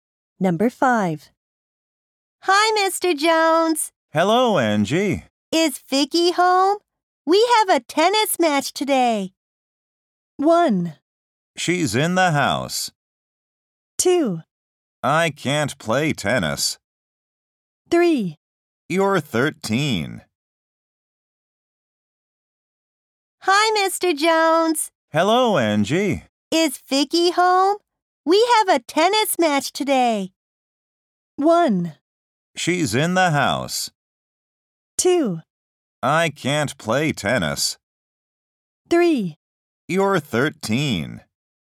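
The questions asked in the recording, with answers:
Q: Is Vicky home? We have a tennis match today.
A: 1: She's in the house.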